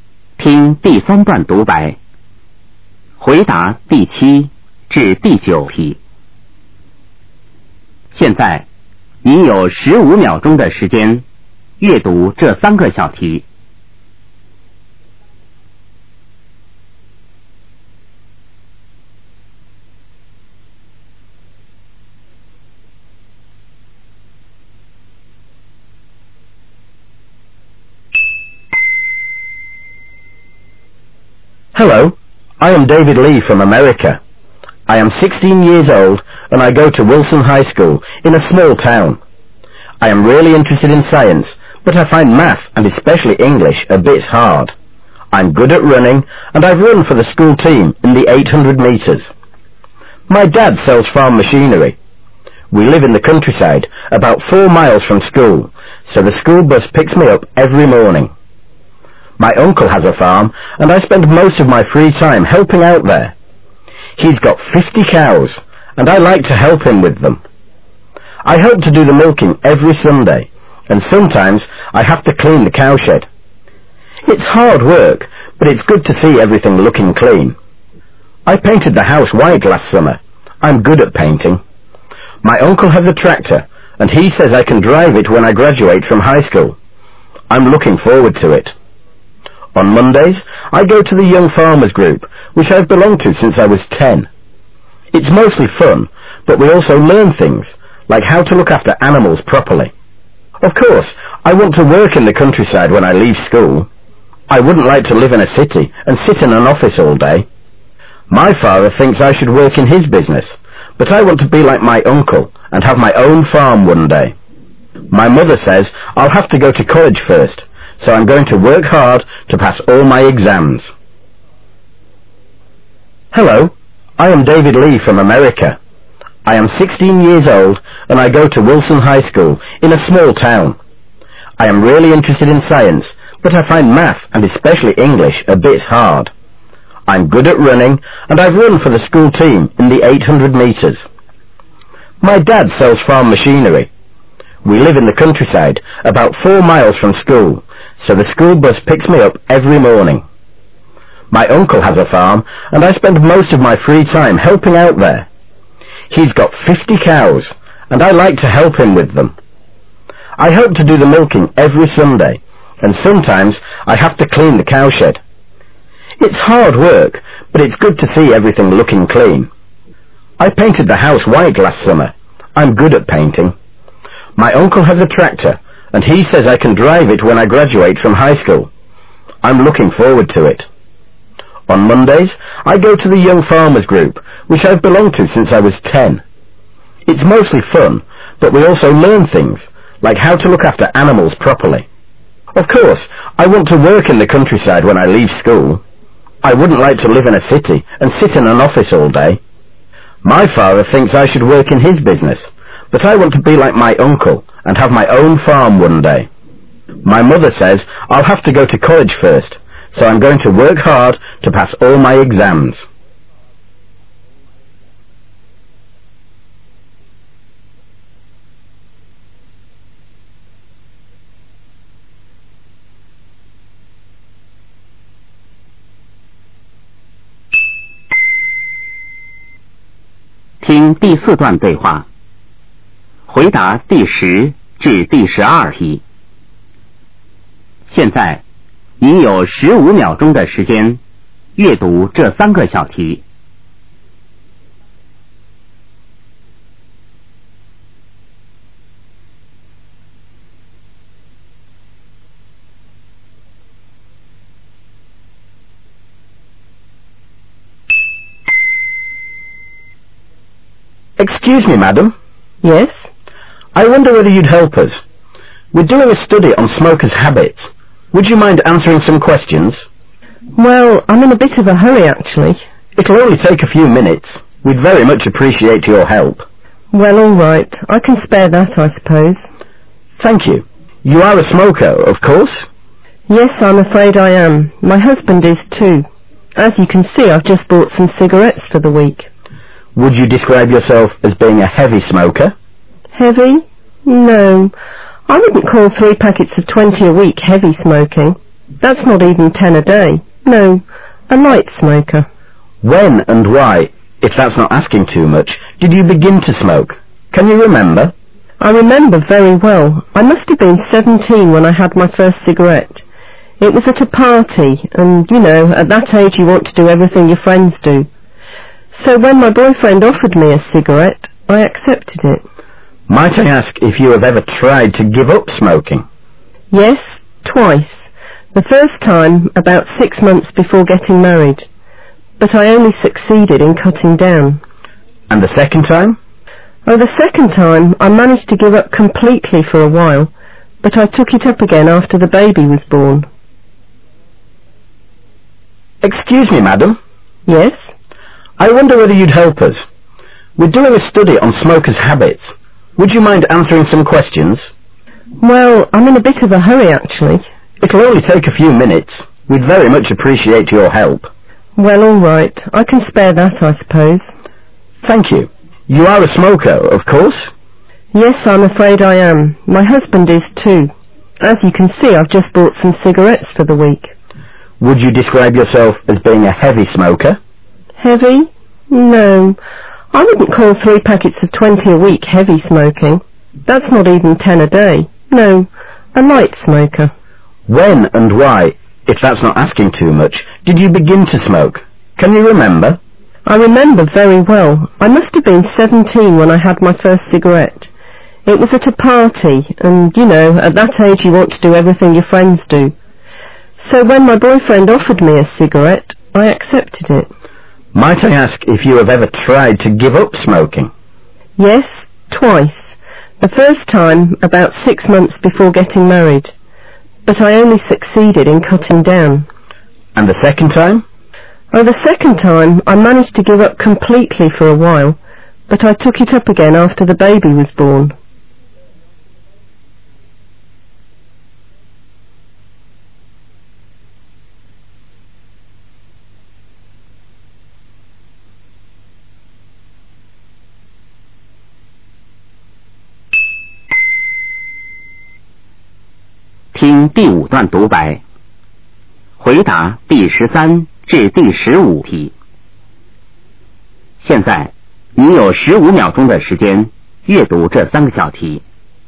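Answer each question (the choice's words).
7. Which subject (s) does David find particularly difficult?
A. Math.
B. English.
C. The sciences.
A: English.

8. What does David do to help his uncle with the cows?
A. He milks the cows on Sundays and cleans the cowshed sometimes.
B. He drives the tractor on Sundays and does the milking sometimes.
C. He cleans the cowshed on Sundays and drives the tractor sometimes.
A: He milks the cows on Sundays and cleans the cowshed sometimes.

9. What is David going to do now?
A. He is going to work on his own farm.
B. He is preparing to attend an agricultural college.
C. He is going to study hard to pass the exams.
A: He is going to study hard to pass the exams.

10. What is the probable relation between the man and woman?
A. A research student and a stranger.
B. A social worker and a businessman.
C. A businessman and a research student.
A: A research student and a stranger.

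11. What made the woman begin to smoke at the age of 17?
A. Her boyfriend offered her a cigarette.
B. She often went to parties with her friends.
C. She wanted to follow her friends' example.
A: She wanted to follow her friends' example.

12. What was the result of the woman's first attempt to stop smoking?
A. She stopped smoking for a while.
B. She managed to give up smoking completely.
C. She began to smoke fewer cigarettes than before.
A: She began to smoke fewer cigarettes than before.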